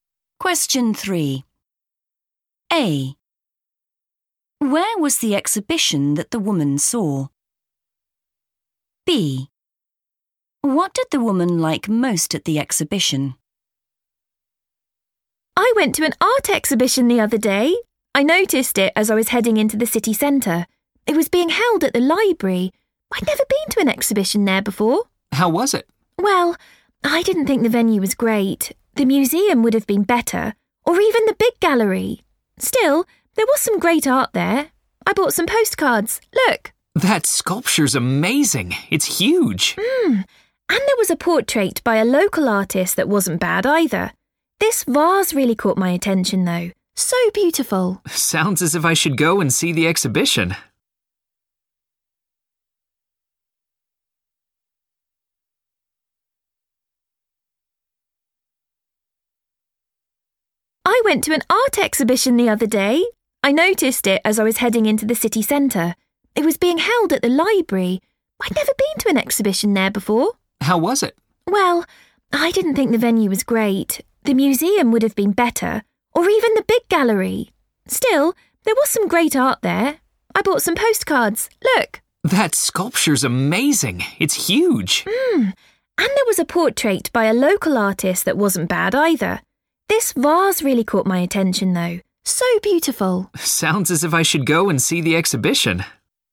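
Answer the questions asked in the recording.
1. the library
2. a vase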